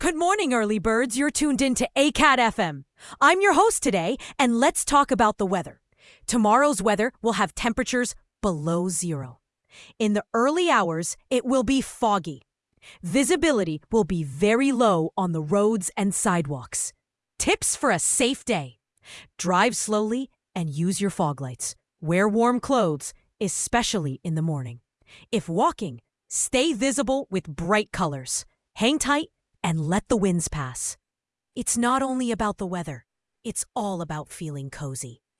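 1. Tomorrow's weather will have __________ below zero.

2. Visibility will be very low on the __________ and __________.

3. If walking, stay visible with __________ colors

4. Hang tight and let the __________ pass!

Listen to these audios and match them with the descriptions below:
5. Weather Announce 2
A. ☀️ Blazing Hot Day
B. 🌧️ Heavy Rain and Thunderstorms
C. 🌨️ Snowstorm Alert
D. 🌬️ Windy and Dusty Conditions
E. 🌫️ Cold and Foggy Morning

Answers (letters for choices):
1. temperatures
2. roads; sidewalks
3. bright
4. winds
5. E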